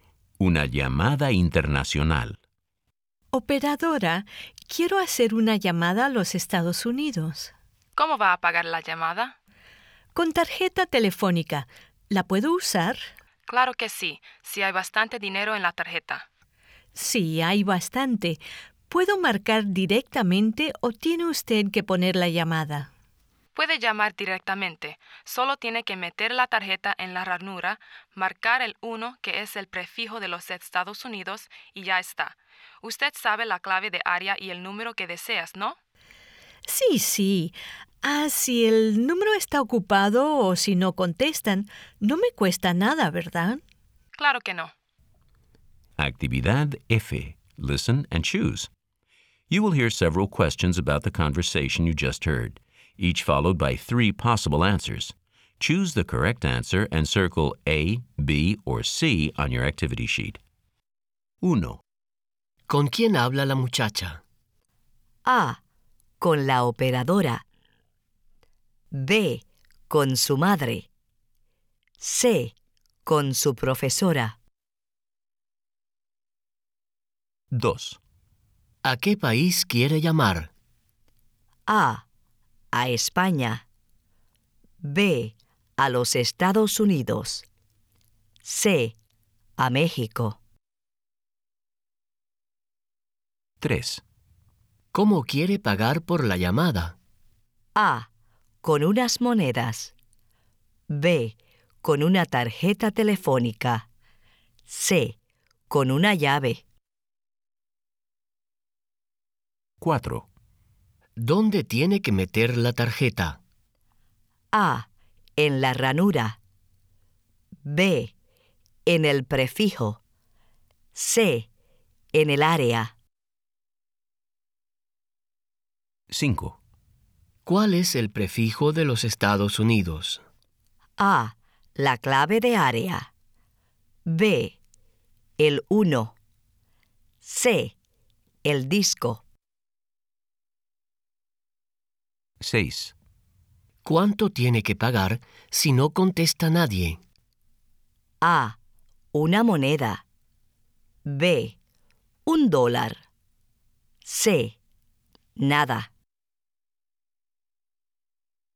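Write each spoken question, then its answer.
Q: ¿Con quién habla la muchacha?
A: A: Con la operadora.

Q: ¿A qué país quiere llamar?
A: B: A los Estados Unidos.

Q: ¿Cómo quiere pagar por la llamada?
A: B: Con una tarjeta telefónica.

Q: ¿Dónde tiene que meter la tarjeta?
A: A: En la ranura.

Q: ¿Cuál es el prefijo de los Estados Unidos?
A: B: El 1.

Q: ¿Cuánto tiene que pagar si no contesta nadie?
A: C: Nada.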